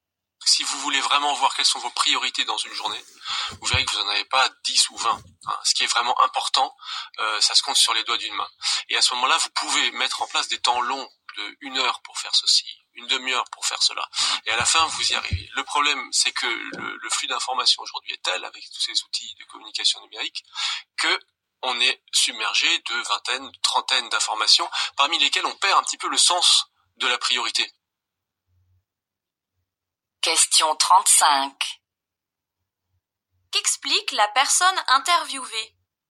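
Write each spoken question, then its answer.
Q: Qu'explique la personne interviewée?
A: Il faut définir quelques priorités malgré le flux d'informations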